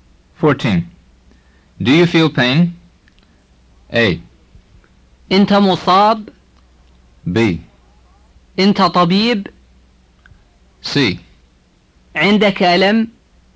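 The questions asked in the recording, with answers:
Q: Do you feel pain?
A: C: عندك ألم.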